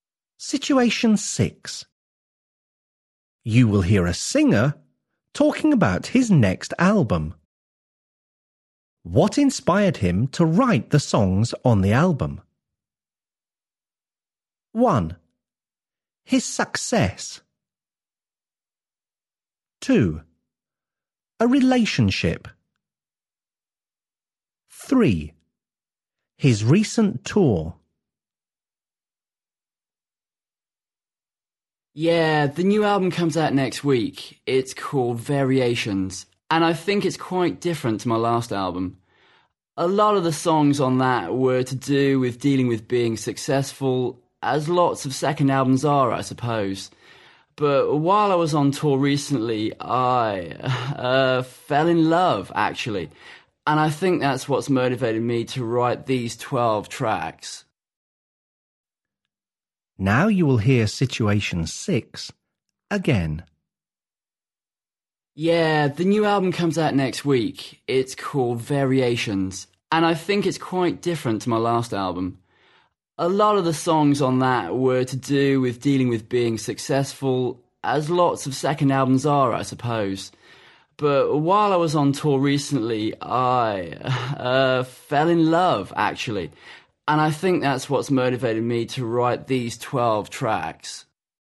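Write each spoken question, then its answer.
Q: What inspired him to write the songs on the album?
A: 2: A relationship.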